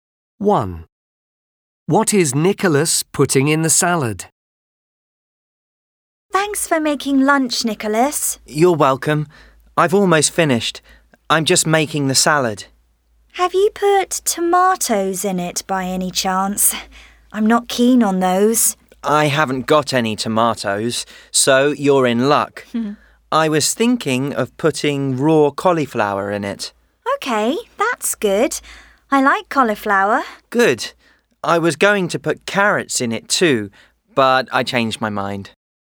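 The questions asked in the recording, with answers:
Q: What is Nicholas putting in the salad?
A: Cauliflower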